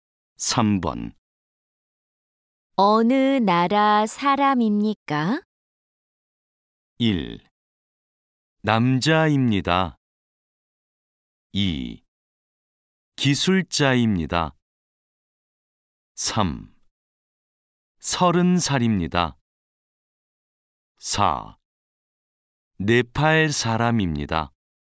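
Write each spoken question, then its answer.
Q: 어느 나라 사람입니까?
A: 4: 네팔 사람입니다.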